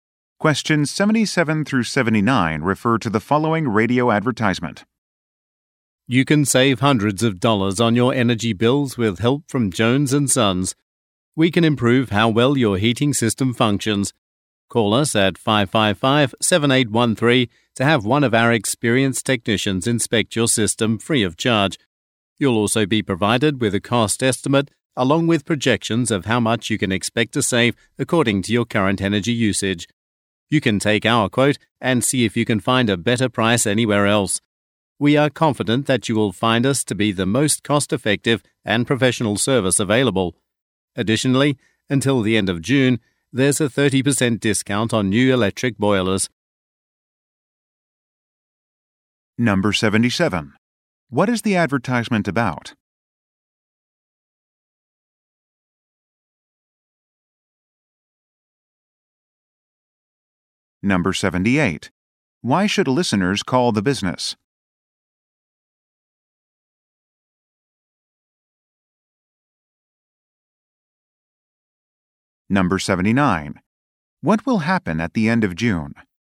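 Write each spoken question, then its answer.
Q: What is the advertisement about?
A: Heating system services

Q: Why should listeners call the business?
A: To get a free inspection of their system

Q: What will happen at the end of June?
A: The 30% discount on new electric boilers will end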